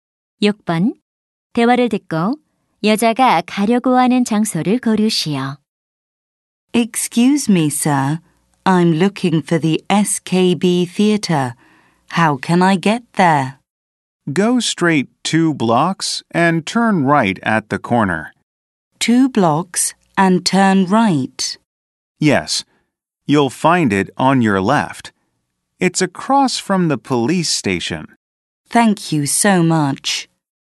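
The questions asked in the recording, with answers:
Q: 대화를 듣고 여자가 가려고 하는 장소를 고르시오.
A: SKB 극장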